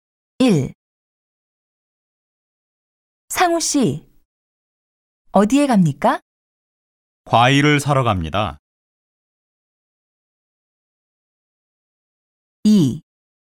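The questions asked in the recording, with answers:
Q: 상우 씨, 어디에 갑니까?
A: 과일 가게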